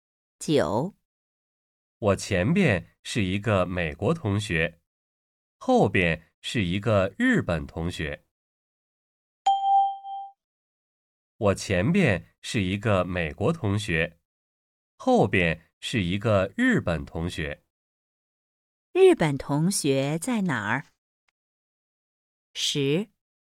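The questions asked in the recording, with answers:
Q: 日本同学在哪儿?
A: 在我后边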